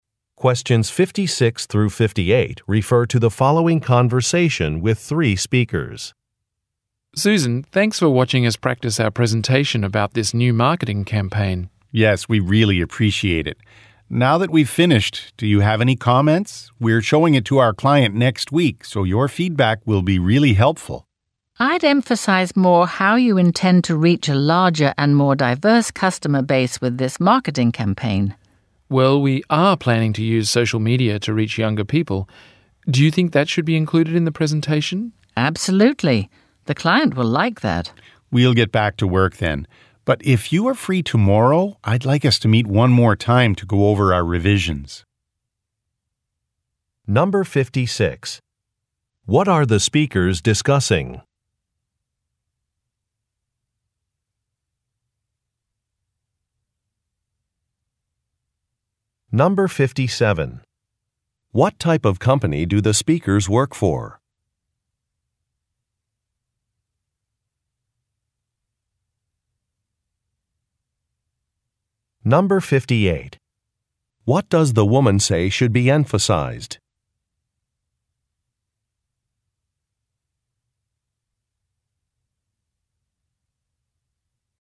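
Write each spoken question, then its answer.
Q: What are the speakers discussing?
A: A presentation about a new marketing campaign

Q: What does the woman say should be emphasized?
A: How they intend to reach a larger and more diverse customer base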